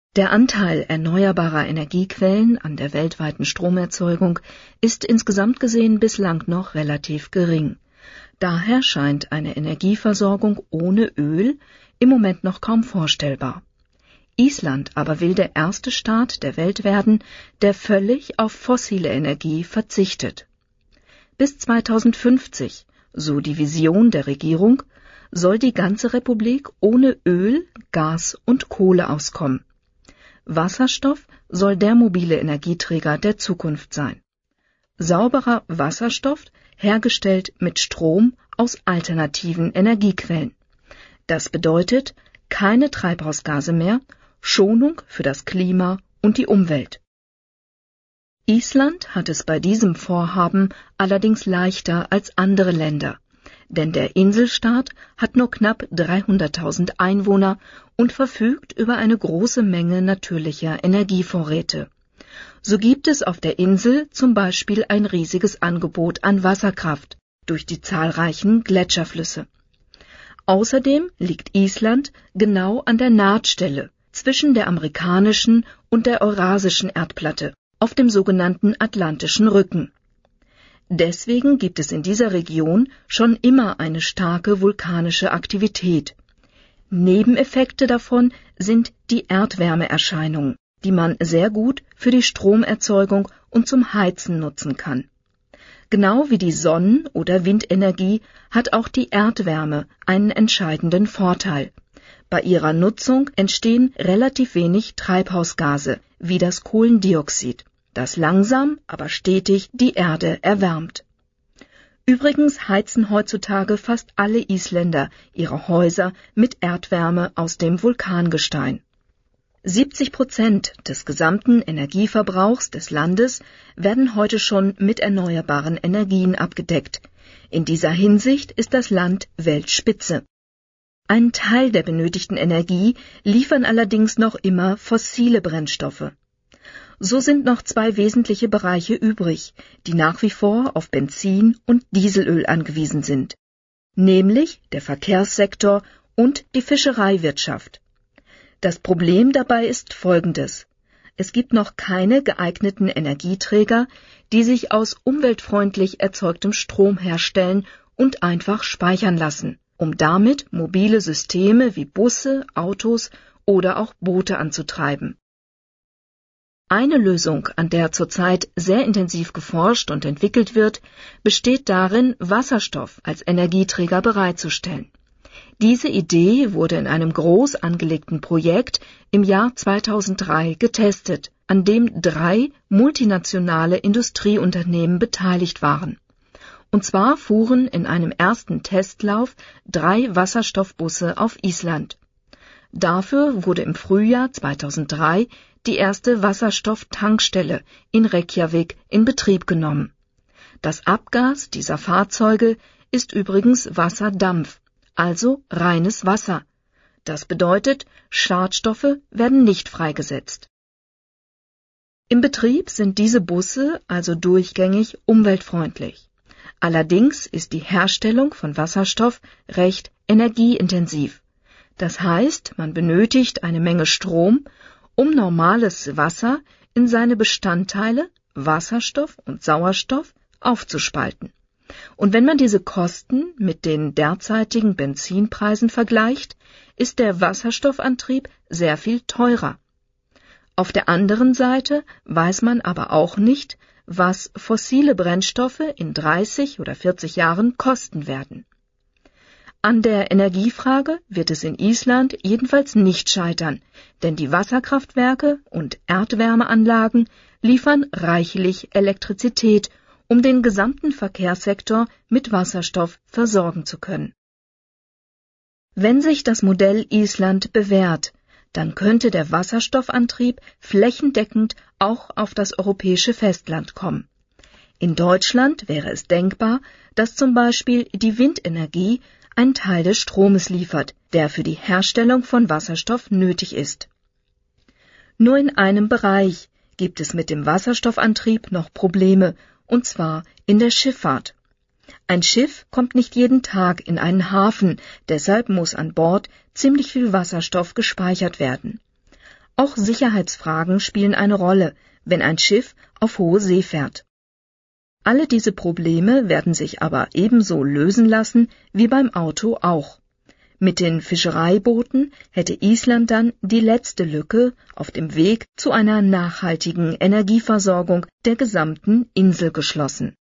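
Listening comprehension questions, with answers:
Beantworten Sie beim Hören die Fragen 19 — 25 in Stichworten.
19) Welche Vorteile hat Island nach Prof. Baumann im Vergleich zu anderen Ländern? Nennen Sie zwei .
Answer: wenige Einwohner (knapp 300.000); große natürliche Energievorräte (z. B. Wasserkraft)

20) Wie kann man nach Prof. Baumann von der vulkanischen Aktivität im Inneren der Erde profitieren?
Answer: Erdwärme zur Stromerzeugung und zum Heizen nutzen

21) Welche beiden Bereiche sind heute noch vom Öl abhängig?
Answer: Verkehrssektor und Fischereiwirtschaft

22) Was wurde im Versuchsprojekt 2003 mit dem neuen Treibstoff getestet?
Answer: drei Wasserstoffbusse

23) Was ist das Problem bei der Herstellung des neuen Treibstoffes?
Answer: sehr energieintensiv, viel Strom nötig, daher teurer als Benzin

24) Was erhofft Prof. Baumann sich, wenn der Modellversuch in Island erfolgreich ist?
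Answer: Wasserstoffantrieb flächendeckend auch auf dem europäischen Festland

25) Weshalb ist es schwierig, den neuen Treibstoff in der Schifffahrt einzusetzen?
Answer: viel Wasserstoff muss an Bord gespeichert werden; Sicherheitsfragen auf hoher See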